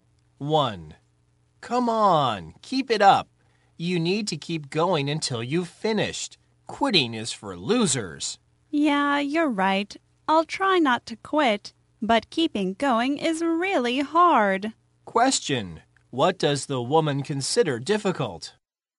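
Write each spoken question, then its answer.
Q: What does the woman consider difficult?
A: Keeping going without quitting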